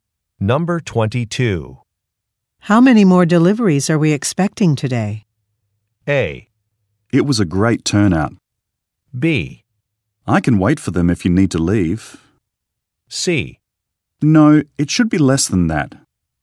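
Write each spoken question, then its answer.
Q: How many more deliveries are we expecting today?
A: B: I can wait for them if you need to leave.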